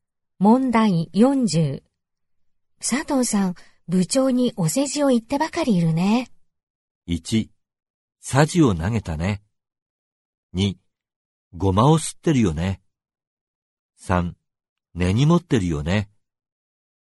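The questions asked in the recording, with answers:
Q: 佐藤さん、部長にお世辞を言ってばかりいるね。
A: 2: ゴマを吸ってるよね。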